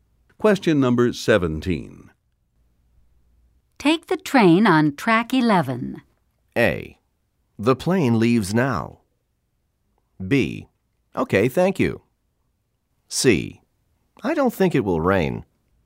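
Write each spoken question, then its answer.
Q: Take the train on track 11.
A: B: Okay, thank you.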